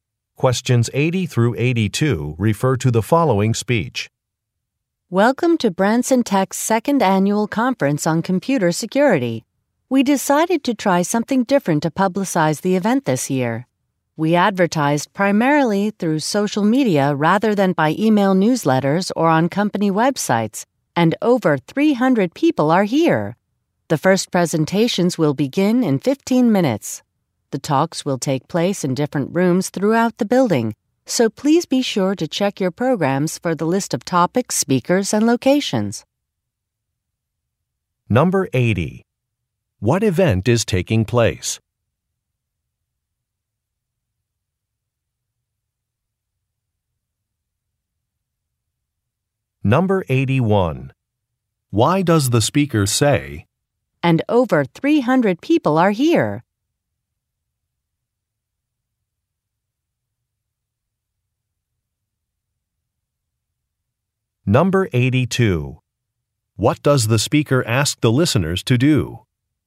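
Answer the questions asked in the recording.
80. A computer security conference
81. To show that advertising on social media worked
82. Check their programs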